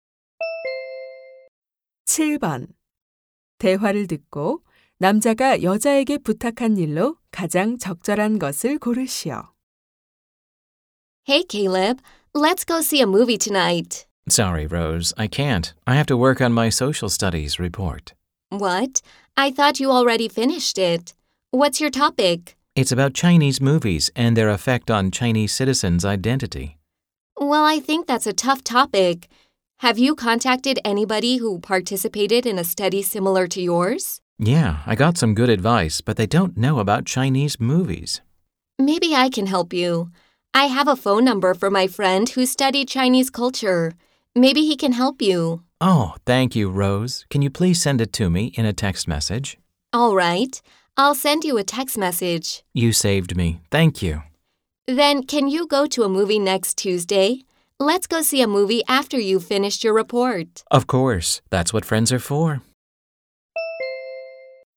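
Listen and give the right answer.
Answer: 친구의 전화번호를 문자로 보내 주기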